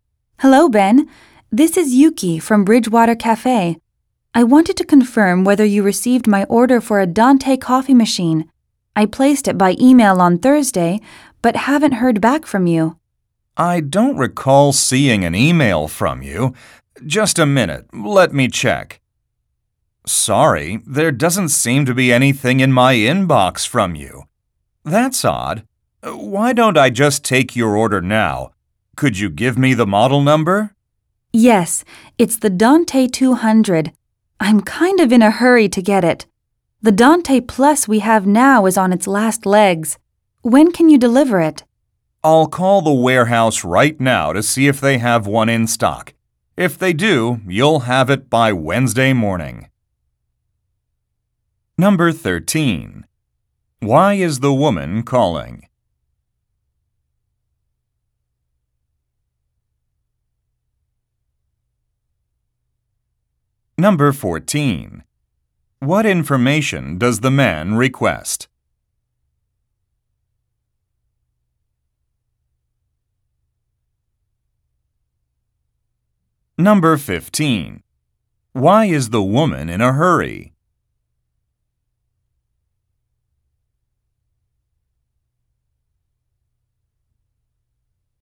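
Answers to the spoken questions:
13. To confirm that her order for a Dante coffee machine was received
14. The model number
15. Her current coffee machine (Dante Plus) is about to break down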